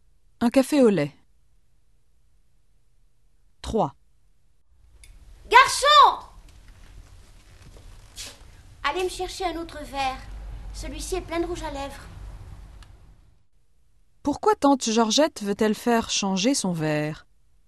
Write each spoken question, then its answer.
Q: Pourquoi tante Georgette veut-elle faire changer son verre?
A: Parce qu'il est plein de rouge à lèvres.